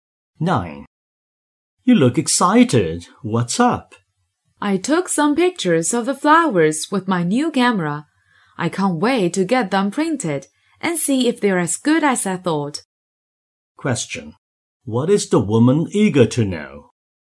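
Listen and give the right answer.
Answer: Whether her flower photos are as good as she thought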